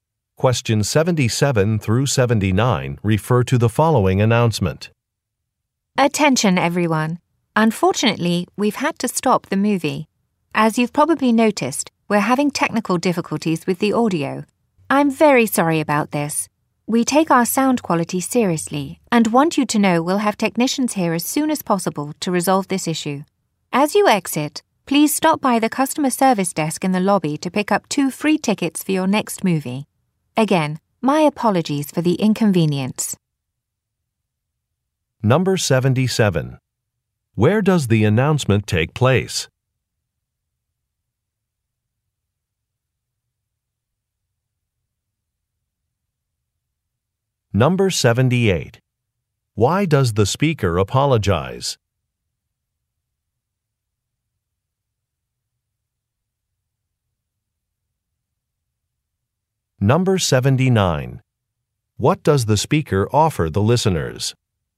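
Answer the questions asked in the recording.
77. At a movie theater
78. There is a problem with the audio
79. Two free movie tickets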